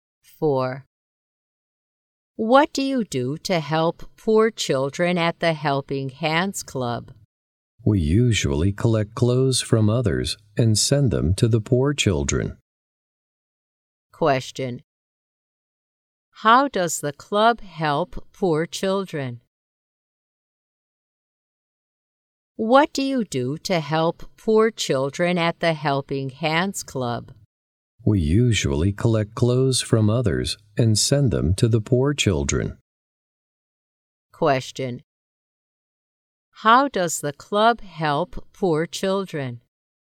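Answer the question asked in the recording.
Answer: It collects clothes from others and sends them to the poor children.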